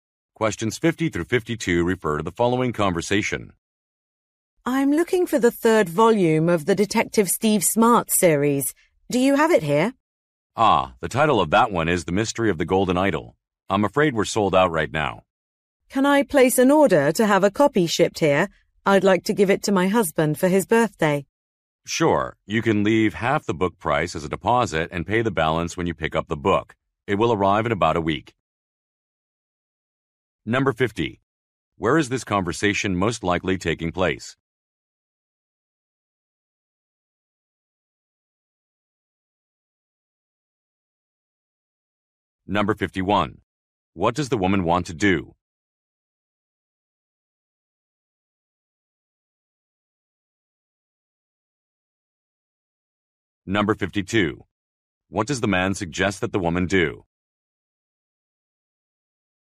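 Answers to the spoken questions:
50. In a bookstore
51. Order a book as a birthday gift for her husband
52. Leave half the price as a deposit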